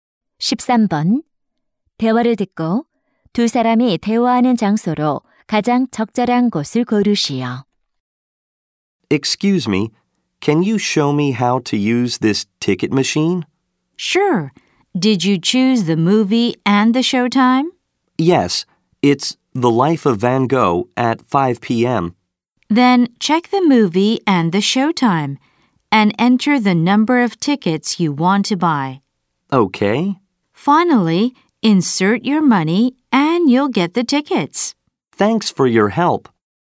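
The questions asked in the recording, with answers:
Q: 대화를 듣고 두 사람이 대화하는 장소로 가장 적절한 곳을 고르시오.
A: 영화관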